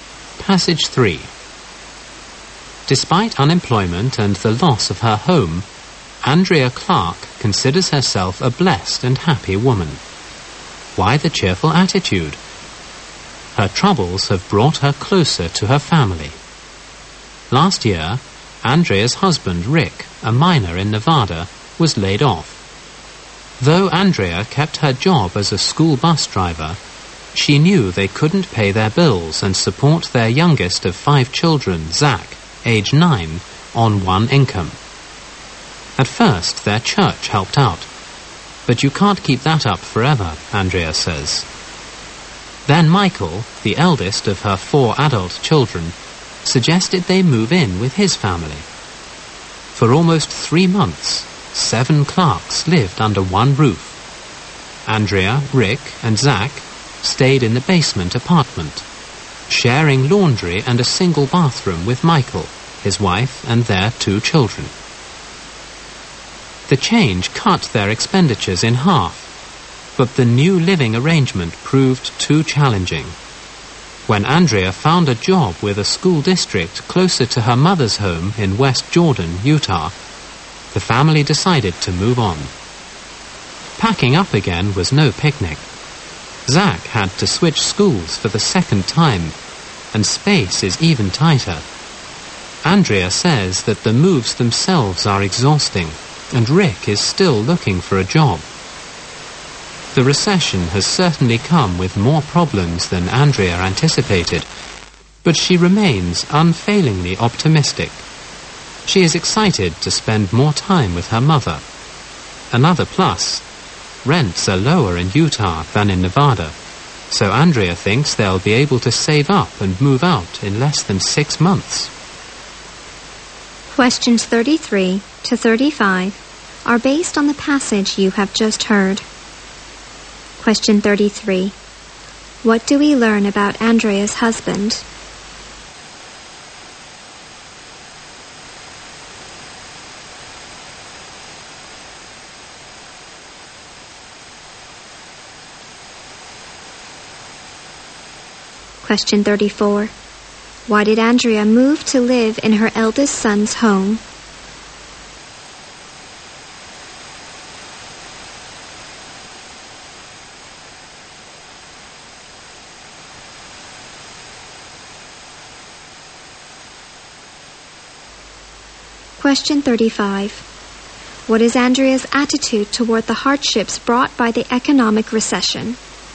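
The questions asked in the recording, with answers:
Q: What do we learn about Andrea's husband?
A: He was a miner who lost his job and is still looking for one.

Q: Why did Andrea move to live in her eldest son's home?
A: They couldn't pay their bills on one income.

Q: What is Andrea's attitude toward the hardships brought by the economic recession?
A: She stays optimistic.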